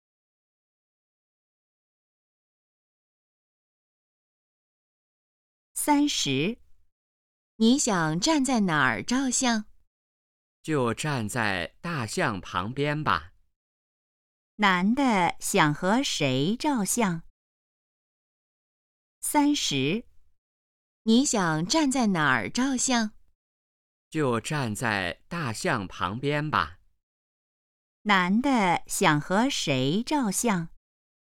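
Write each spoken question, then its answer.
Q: 男的想和谁照相?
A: 大象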